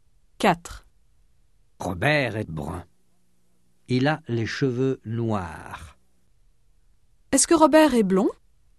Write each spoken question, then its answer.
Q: Est-ce que Robert est blond?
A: Non, il n'est pas blond. Il est brun.